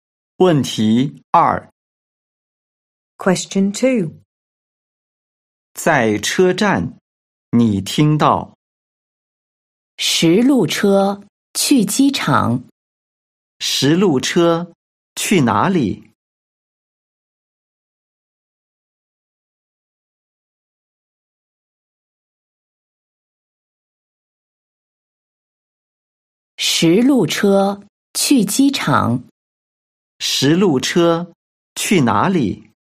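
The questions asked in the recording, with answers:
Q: 十路车去哪里?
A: 机场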